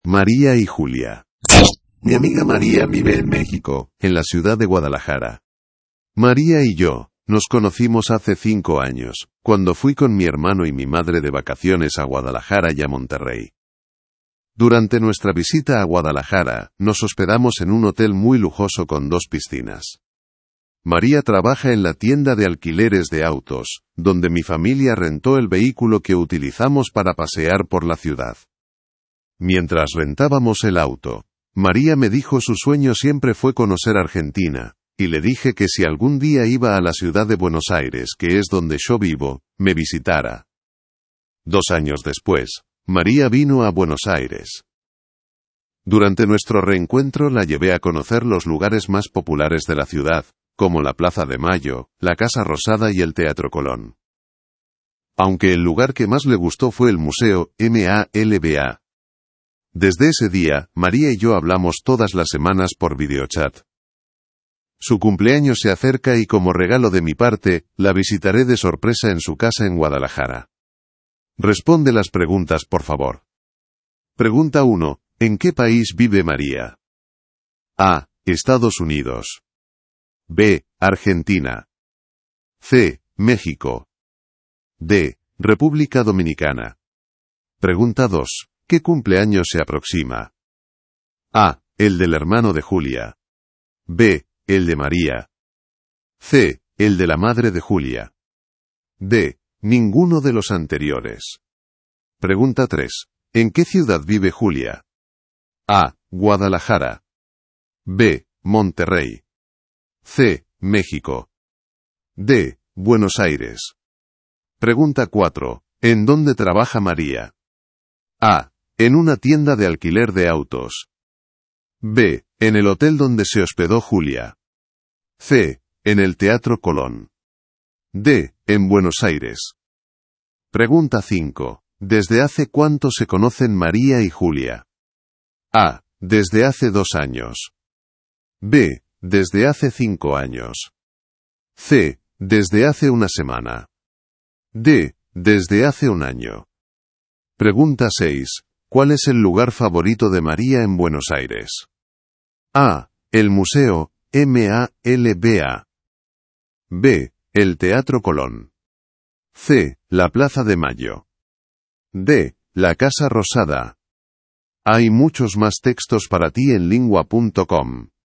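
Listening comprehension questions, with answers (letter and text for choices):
Dann beantworte die folgenden Fragen zum Text:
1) ¿En qué país vive María?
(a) Estados Unidos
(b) Argentina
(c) México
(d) República Dominicana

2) ¿Qué cumpleaños se aproxima?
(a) El del hermano de Julia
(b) El de María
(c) El de la madre de Julia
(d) Ninguno de los anteriores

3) ¿En qué ciudad vive Julia?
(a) Guadalajara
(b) Monterrey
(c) México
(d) Buenos Aires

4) ¿En dónde trabaja María?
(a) En una tienda de alquiler de autos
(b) En el hotel donde se hospedó Julia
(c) En el Teatro Colón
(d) En Buenos Aires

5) ¿Desde hace cuánto se conocen María y Julia?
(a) Desde hace dos años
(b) Desde hace 5 años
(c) Desde hace una semana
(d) Desde hace un año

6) ¿Cuál es el lugar favorito de María en Buenos Aires?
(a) El museo MALBA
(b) El Teatro Colón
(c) La Plaza de Mayo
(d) La Casa Rosada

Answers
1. (c) México
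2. (b) El de María
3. (d) Buenos Aires
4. (a) En una tienda de alquiler de autos
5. (b) Desde hace 5 años
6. (a) El museo MALBA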